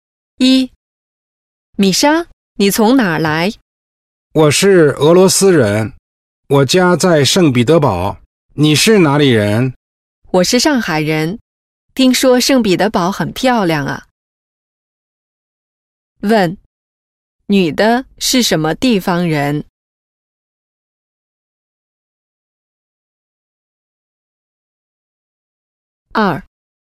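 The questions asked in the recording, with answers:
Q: 问,女的是什么地方人?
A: 上海人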